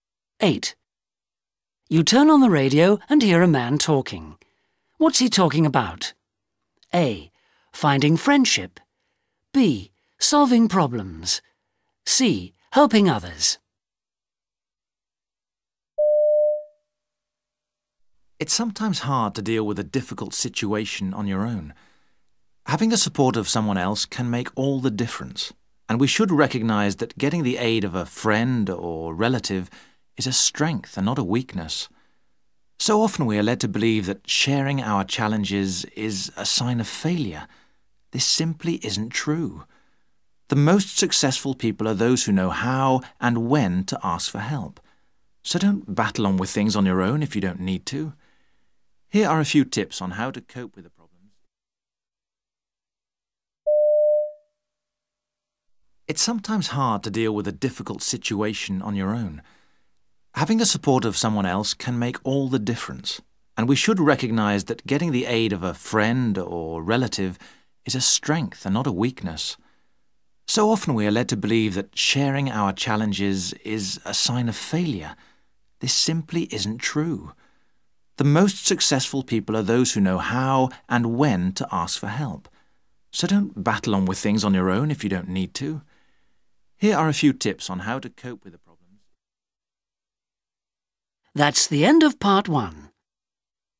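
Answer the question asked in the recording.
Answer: B: Solving problems.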